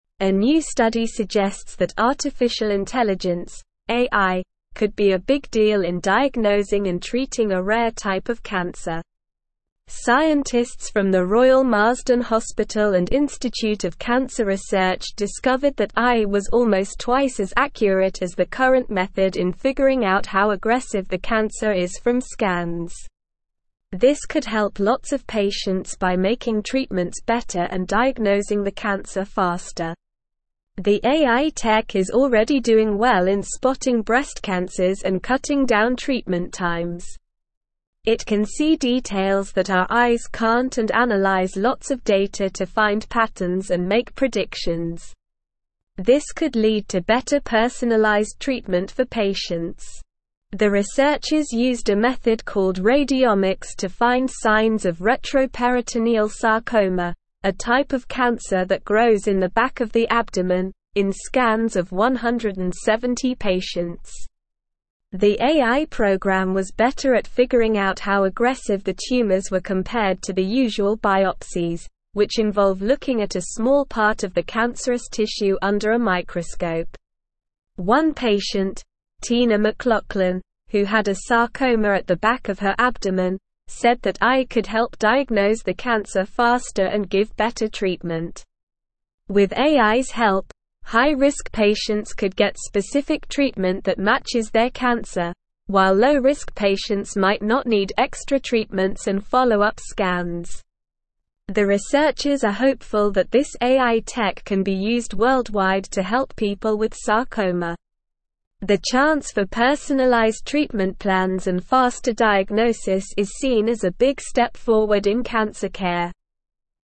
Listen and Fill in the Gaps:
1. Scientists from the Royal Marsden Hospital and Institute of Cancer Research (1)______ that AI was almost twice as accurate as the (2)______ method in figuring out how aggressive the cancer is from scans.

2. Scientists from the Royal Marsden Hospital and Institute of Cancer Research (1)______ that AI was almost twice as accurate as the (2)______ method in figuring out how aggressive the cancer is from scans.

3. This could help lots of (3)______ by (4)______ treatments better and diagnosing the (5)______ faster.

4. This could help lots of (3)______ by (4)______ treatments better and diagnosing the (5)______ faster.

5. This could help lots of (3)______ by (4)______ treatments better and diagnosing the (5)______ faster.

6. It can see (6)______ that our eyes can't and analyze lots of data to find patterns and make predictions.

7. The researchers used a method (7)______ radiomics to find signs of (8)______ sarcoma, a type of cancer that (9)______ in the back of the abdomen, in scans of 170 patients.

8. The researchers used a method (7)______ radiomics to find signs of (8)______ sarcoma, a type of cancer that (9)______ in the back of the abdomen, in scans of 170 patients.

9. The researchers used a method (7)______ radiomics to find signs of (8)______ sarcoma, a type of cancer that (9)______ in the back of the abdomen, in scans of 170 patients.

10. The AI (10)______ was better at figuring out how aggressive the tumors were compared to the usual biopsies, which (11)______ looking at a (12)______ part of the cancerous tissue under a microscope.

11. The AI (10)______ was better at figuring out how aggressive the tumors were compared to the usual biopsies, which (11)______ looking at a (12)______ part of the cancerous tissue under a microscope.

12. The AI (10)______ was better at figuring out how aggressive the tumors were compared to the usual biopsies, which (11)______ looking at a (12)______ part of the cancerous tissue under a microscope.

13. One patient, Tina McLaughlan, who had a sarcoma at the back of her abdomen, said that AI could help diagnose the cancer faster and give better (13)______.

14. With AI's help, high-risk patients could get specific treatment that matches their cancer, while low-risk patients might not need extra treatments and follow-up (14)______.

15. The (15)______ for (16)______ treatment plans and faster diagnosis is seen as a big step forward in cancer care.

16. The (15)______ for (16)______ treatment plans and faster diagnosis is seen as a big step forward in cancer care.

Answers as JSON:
{"1": "discovered", "2": "current", "3": "patients", "4": "making", "5": "cancer", "6": "details", "7": "called", "8": "retroperitoneal", "9": "grows", "10": "program", "11": "involve", "12": "small", "13": "treatment", "14": "scans", "15": "chance", "16": "personalized"}

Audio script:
A new study suggests that artificial intelligence (AI) could be a big deal in diagnosing and treating a rare type of cancer. Scientists from the Royal Marsden Hospital and Institute of Cancer Research discovered that AI was almost twice as accurate as the current method in figuring out how aggressive the cancer is from scans. This could help lots of patients by making treatments better and diagnosing the cancer faster.
The AI tech is already doing well in spotting breast cancers and cutting down treatment times. It can see details that our eyes can't and analyze lots of data to find patterns and make predictions. This could lead to better personalized treatment for patients.
The researchers used a method called radiomics to find signs of retroperitoneal sarcoma, a type of cancer that grows in the back of the abdomen, in scans of 170 patients. The AI program was better at figuring out how aggressive the tumors were compared to the usual biopsies, which involve looking at a small part of the cancerous tissue under a microscope.
One patient, Tina McLaughlan, who had a sarcoma at the back of her abdomen, said that AI could help diagnose the cancer faster and give better treatment. With AI's help, high-risk patients could get specific treatment that matches their cancer, while low-risk patients might not need extra treatments and follow-up scans.
The researchers are hopeful that this AI tech can be used worldwide to help people with sarcoma. The chance for personalized treatment plans and faster diagnosis is seen as a big step forward in cancer care.

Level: Level 3